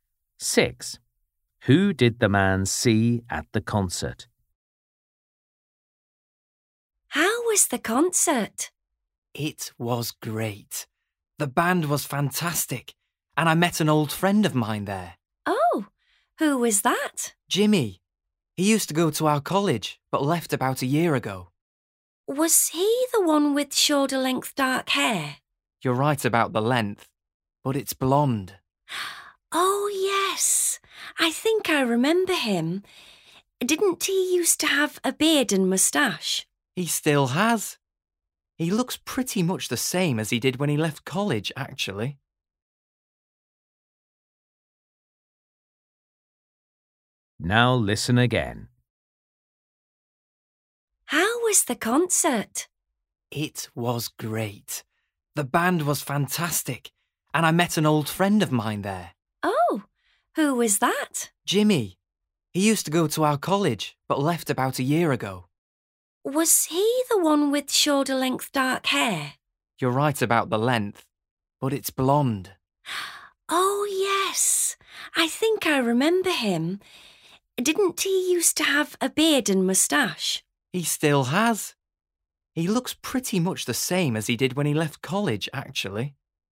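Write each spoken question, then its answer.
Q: Who did the man see at the concert?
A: Jimmy, with shoulder-length blonde hair, a beard and a moustache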